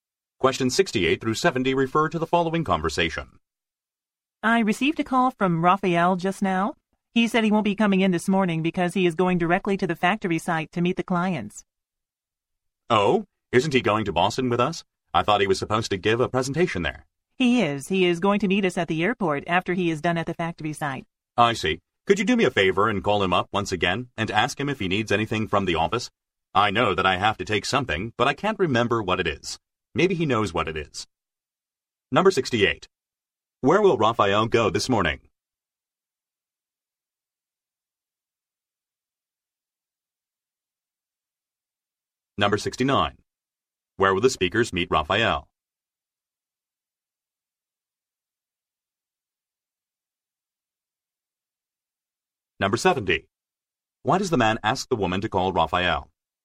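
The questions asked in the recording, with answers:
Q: Where will Raphael go this morning?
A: To the factory site

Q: Where will the speakers meet Raphael?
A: At the airport

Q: Why does the man ask the woman to call Raphael?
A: To ask if he needs anything from the office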